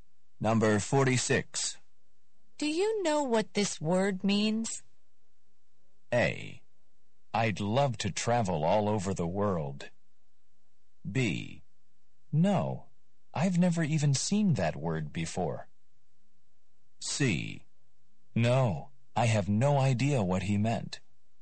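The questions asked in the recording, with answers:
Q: Do you know what this word means?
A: B: No, I've never even seen that word before.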